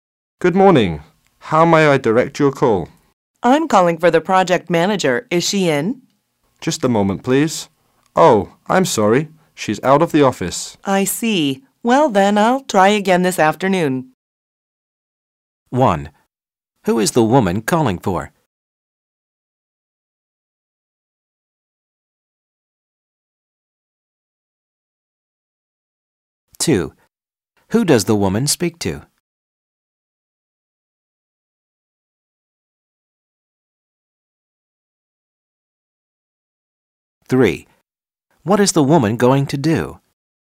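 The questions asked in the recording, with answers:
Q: Who is the woman calling for?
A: The project manager

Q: What is the woman going to do?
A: Call again this afternoon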